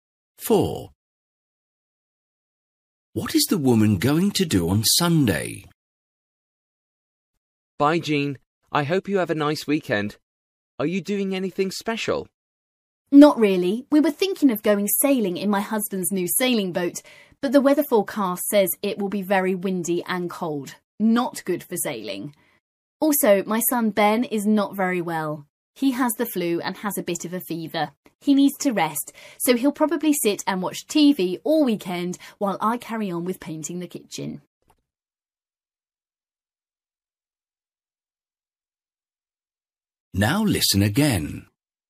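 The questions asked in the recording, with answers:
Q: What is the woman going to do on Sunday?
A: Paint the kitchen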